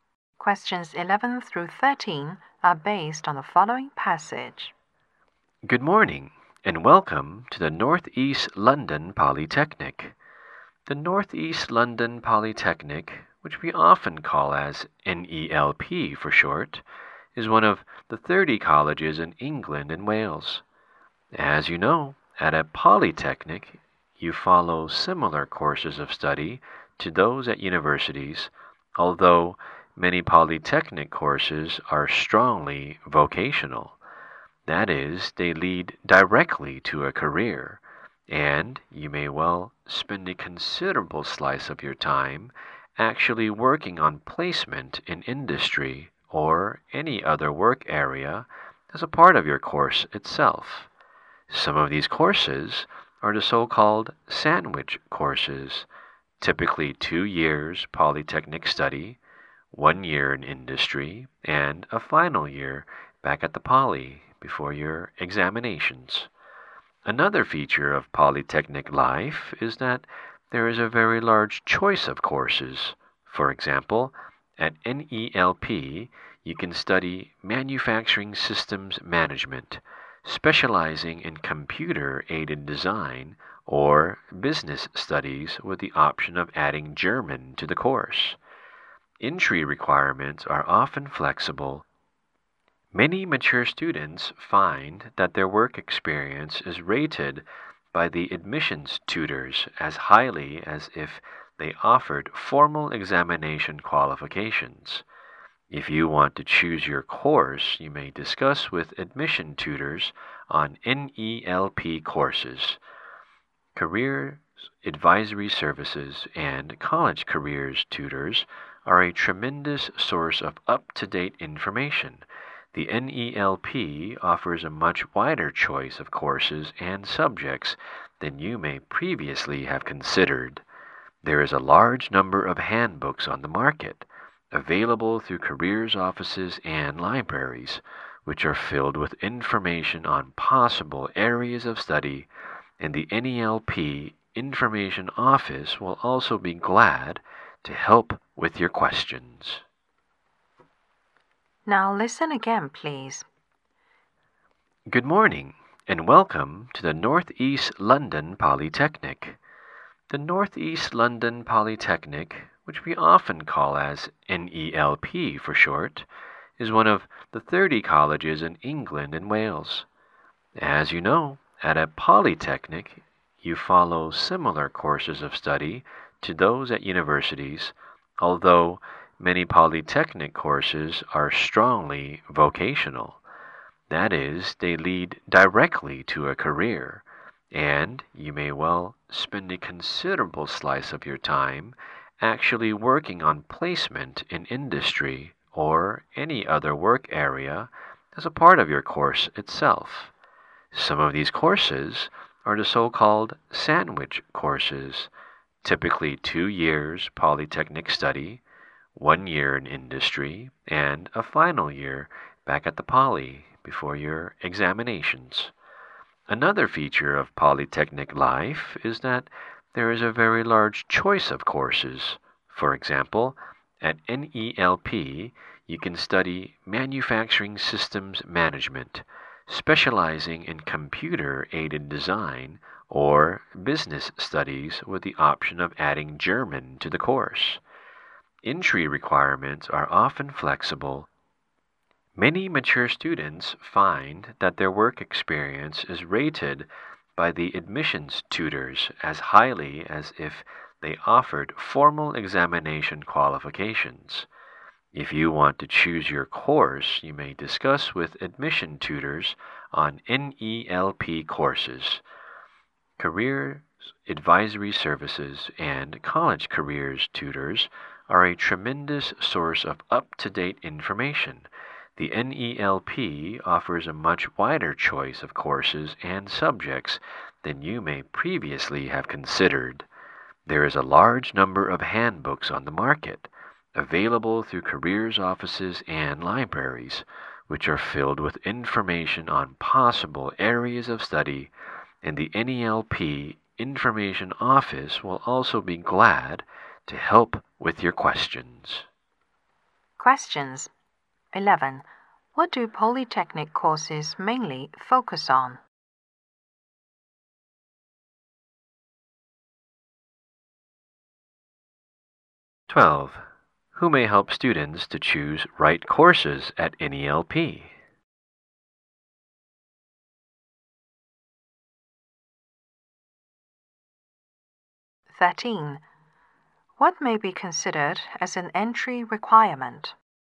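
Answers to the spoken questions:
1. Vocational training leading to a career
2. Admission tutors
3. Work experience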